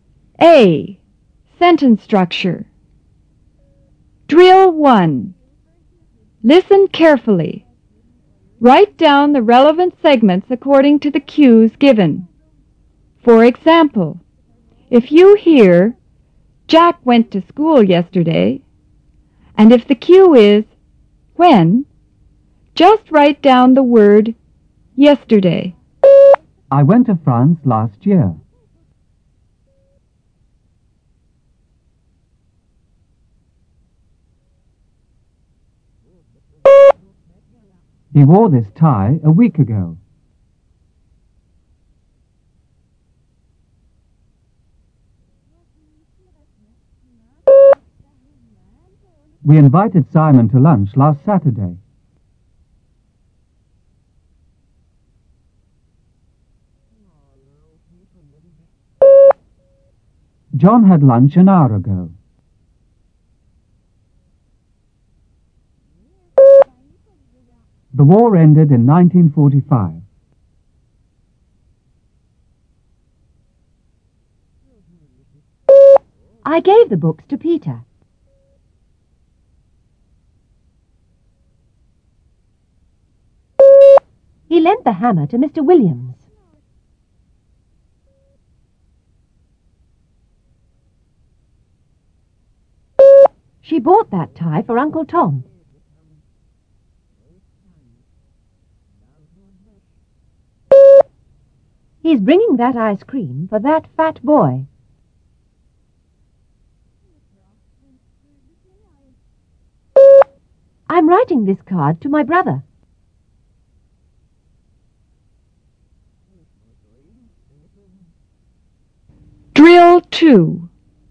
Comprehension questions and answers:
Drill 1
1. Where?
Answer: I went to France last year.

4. Who?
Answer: John had lunch an hour ago.

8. For whom?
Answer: She bought that tie for Uncle Tom.